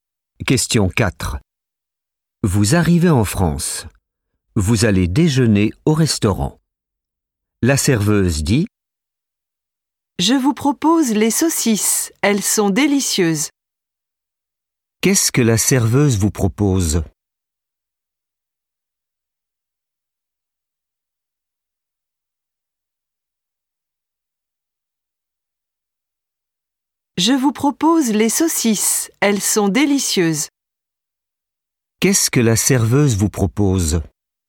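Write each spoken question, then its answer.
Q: Qu'est-ce que la serveuse vous propose ?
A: Les saucisses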